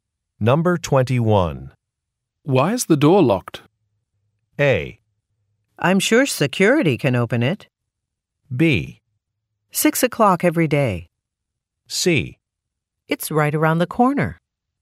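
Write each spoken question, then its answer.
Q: Why is the door locked?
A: A: I'm sure security can open it.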